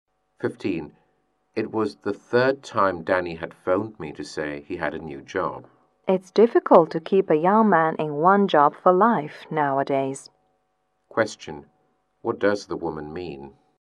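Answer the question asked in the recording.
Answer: Young people change jobs often nowadays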